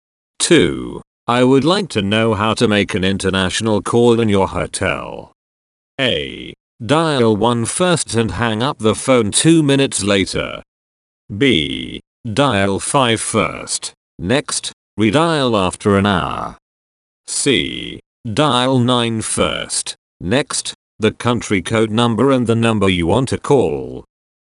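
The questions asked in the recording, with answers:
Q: I would like to know how to make an international call in your hotel.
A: C: Dial 9 first. Next, the country code number and the number you want to call.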